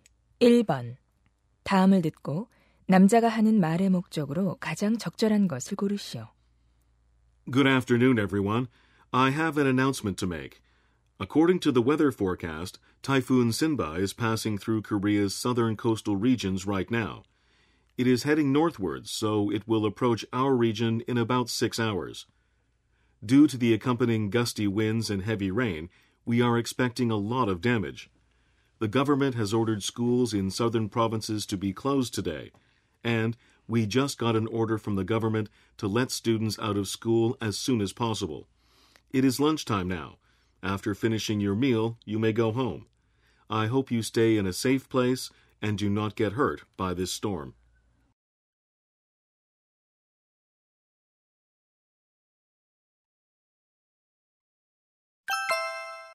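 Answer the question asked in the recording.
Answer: 태풍 때문에 학생들의 조기 귀가(하교)를 알리려고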